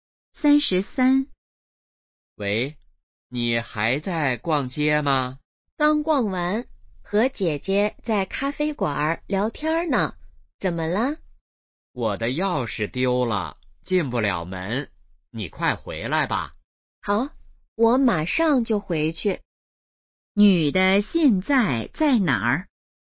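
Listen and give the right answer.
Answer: 咖啡馆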